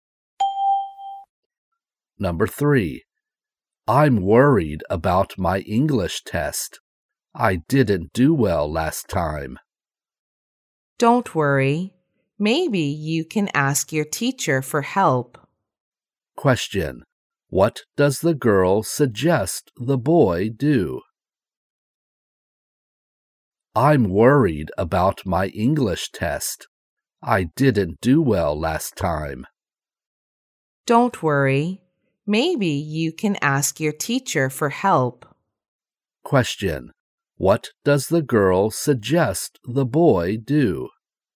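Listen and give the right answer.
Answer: Ask his teacher for help.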